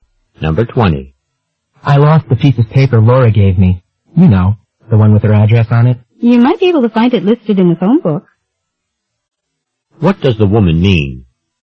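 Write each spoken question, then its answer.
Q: What does the woman mean?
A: He could find Laura's address in the phone book.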